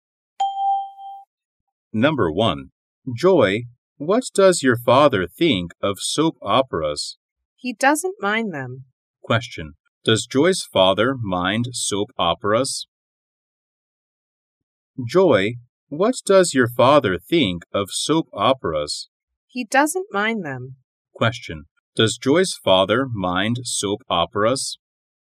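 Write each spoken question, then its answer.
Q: Does Joy's father mind soap operas?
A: No, he doesn't.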